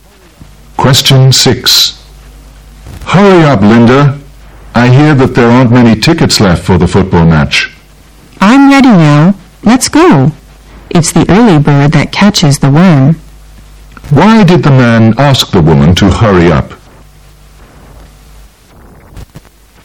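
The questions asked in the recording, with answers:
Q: Why did the man ask the woman to hurry up?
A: There aren't many tickets left for the football match.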